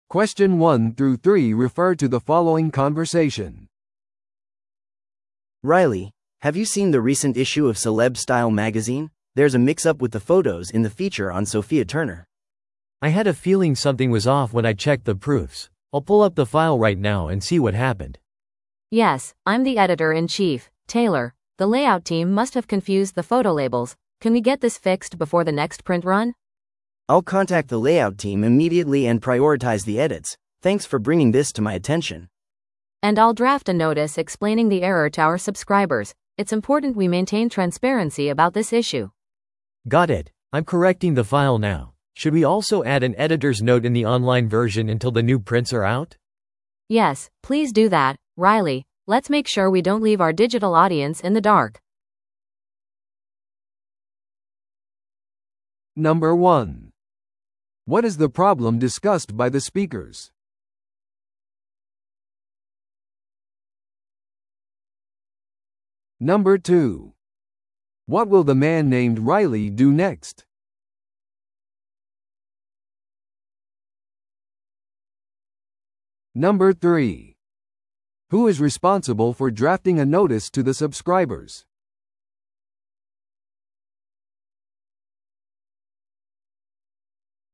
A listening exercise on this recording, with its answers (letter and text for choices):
Listen to the audio below and answer the questions.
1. What is the problem discussed by the speakers?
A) ウェブサイトの不具合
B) セレブの名前のタイプミス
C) 雑誌の写真の位置が間違っている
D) 雑誌の発行が遅れている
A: C) 雑誌の写真の位置が間違っている

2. What will the man named Riley do next?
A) ソフィア・ターナーに謝罪の手紙を送る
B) 写真のラベルを再配置する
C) オンライン版に編集者の注釈を追加する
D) 雑誌の表紙を再デザインする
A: C) オンライン版に編集者の注釈を追加する

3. Who is responsible for drafting a notice to the subscribers?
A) 写真の入れ替えについて話していた男性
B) 編集長である女性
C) レイアウトチームの責任者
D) 特集されていたセレブリティ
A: B) 編集長である女性

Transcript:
A: Riley, have you seen the recent issue of Celeb Style Magazine? There's a mix-up with the photos in the feature on Sophia Turner.
B: I had a feeling something was off when I checked the proofs. I'll pull up the file right now and see what happened.
C: Yes, I'm the editor-in-chief, Taylor. The layout team must have confused the photo labels. Can we get this fixed before the next print run?
A: I'll contact the layout team immediately and prioritize the edits. Thanks for bringing this to my attention.
C: And I'll draft a notice explaining the error to our subscribers. It's important we maintain transparency about this issue.
B: Got it. I'm correcting the file now. Should we also add an editor's note in the online version until the new prints are out?
C: Yes, please do that, Riley. Let's make sure we don't leave our digital audience in the dark.